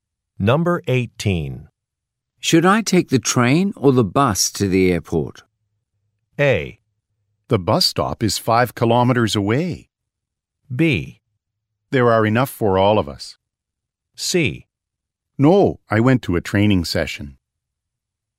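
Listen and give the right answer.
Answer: A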